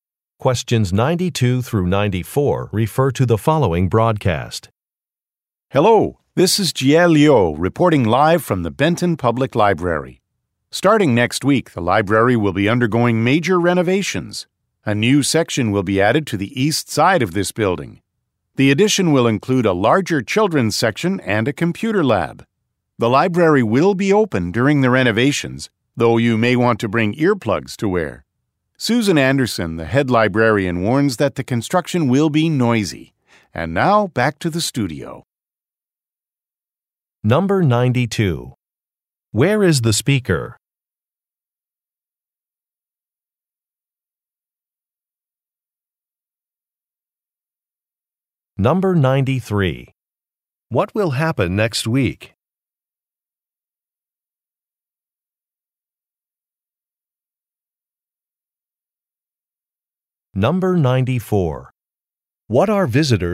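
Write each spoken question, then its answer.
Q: Where is the speaker?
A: At the Benton Public Library

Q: What will happen next week?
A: The library will begin major renovations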